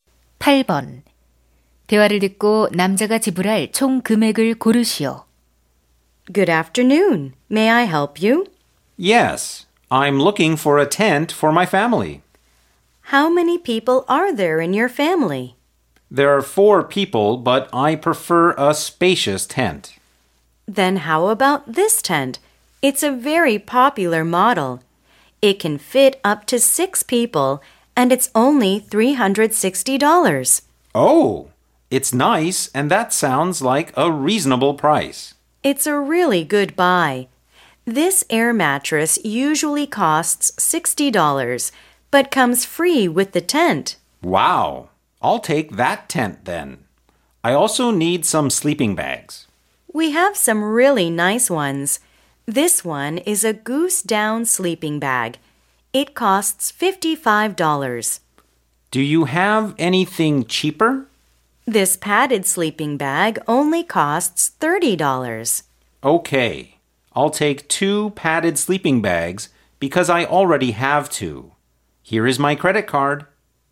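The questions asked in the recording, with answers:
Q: 대화를 듣고 남자가 지불할 총 금액을 고르시오.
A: $420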